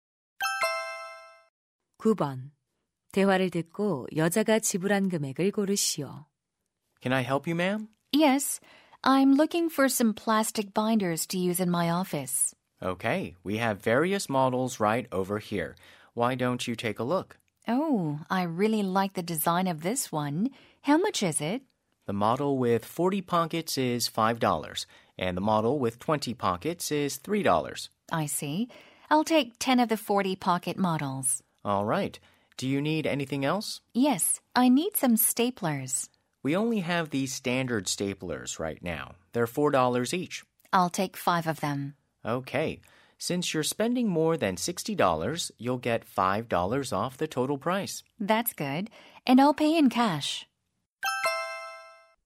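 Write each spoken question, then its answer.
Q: 대화를 듣고 여자가 지불한 금액을 고르시오.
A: 65달러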